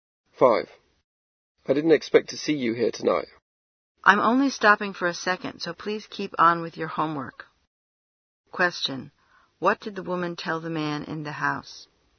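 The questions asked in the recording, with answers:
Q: What did the woman tell the man in the house?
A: To keep on with his homework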